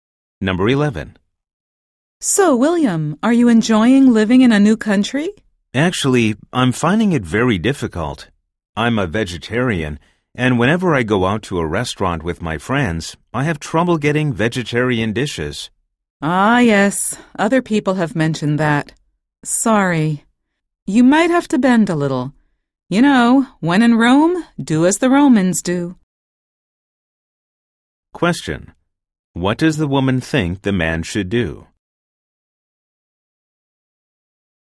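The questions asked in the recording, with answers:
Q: What does the woman think the man should do?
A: Adapt to local customs and be flexible about eating vegetarian dishes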